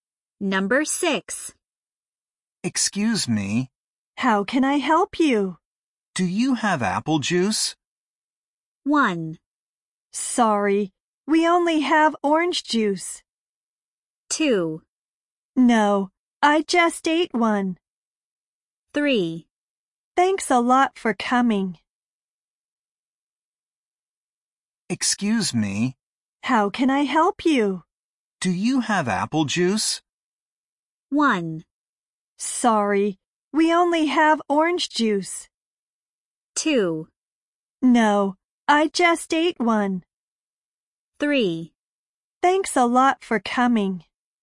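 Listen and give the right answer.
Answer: 1: Sorry, we only have orange juice.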